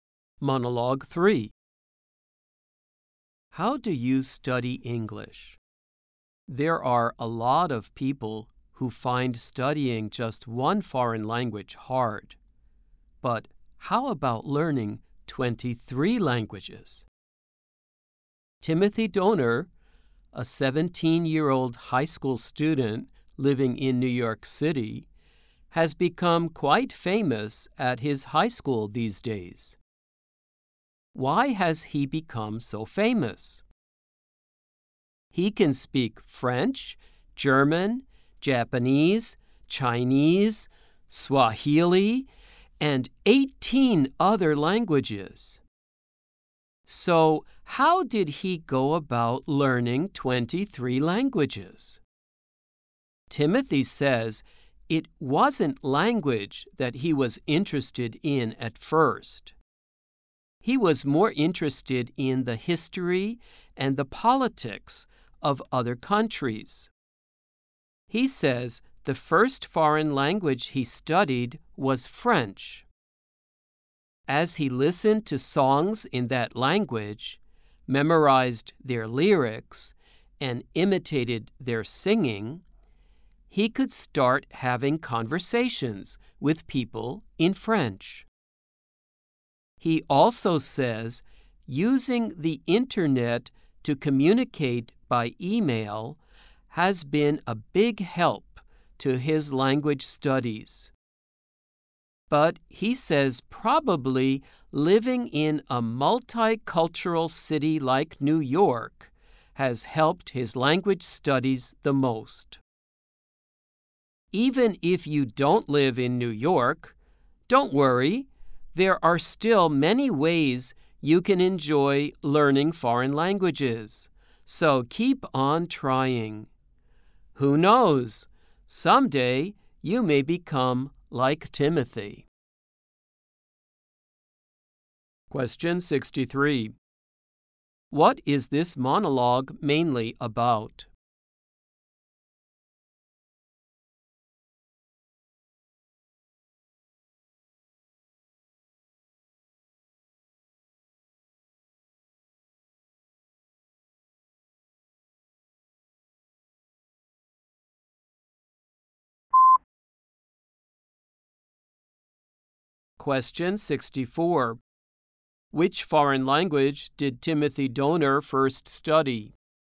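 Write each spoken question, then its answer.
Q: What is this monologue mainly about?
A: A high school student who learned 23 languages

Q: Which foreign language did Timothy Donner first study?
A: French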